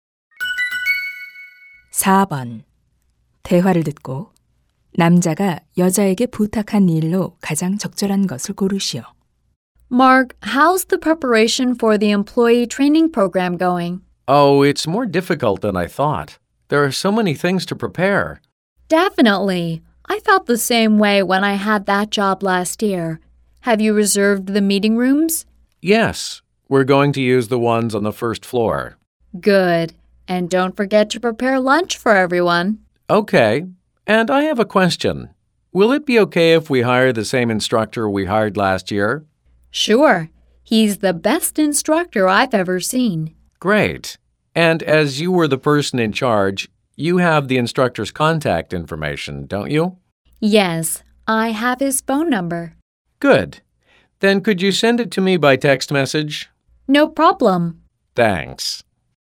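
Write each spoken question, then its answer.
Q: 대화를 듣고 남자가 여자에게 부탁한 일로 가장 적절한 것을 고르시오.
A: 강사의 연락처를 문자로 보내 주기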